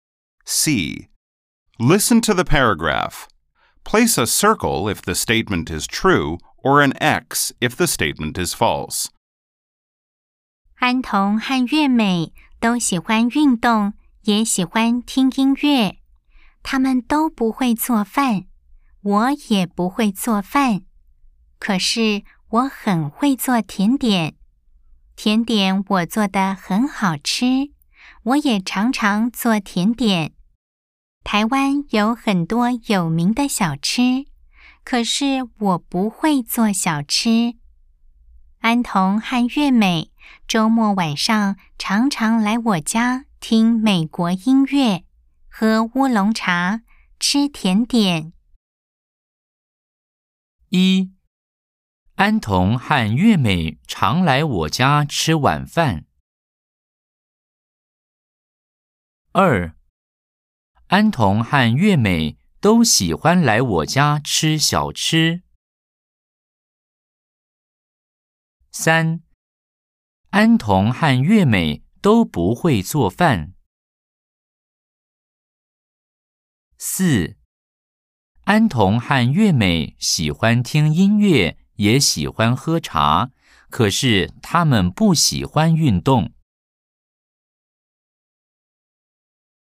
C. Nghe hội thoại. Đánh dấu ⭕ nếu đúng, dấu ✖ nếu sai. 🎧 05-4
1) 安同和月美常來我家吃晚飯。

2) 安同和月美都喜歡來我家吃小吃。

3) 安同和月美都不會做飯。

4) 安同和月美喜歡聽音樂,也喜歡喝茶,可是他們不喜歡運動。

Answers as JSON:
{"1": "X", "2": "X", "3": "O", "4": "X"}